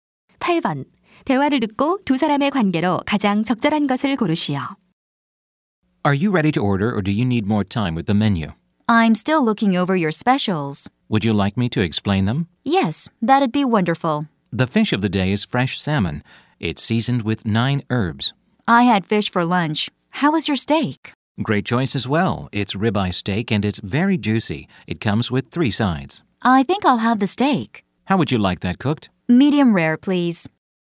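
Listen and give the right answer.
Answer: 종업원과 손님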